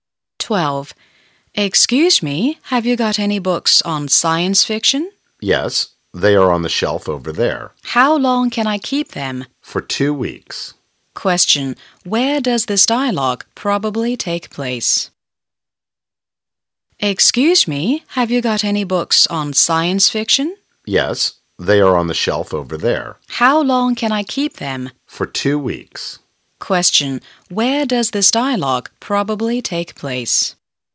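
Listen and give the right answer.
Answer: In a library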